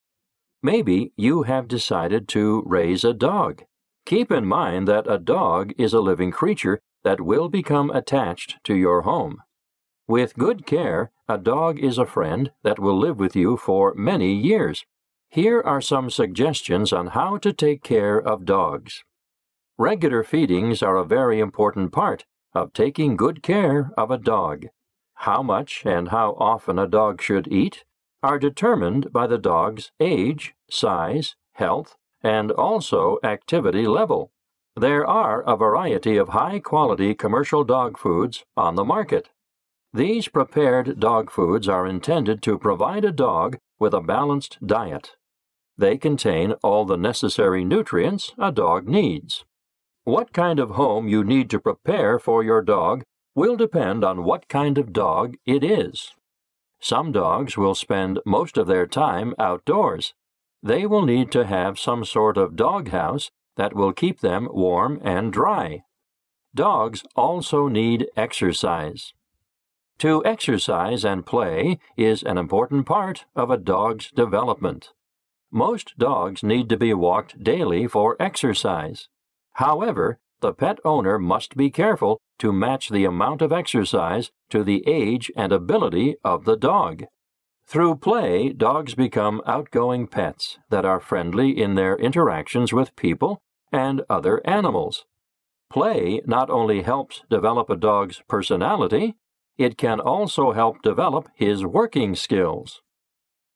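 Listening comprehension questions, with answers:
What does the speaker mainly talk about?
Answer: Suggestions on how to take care of dogs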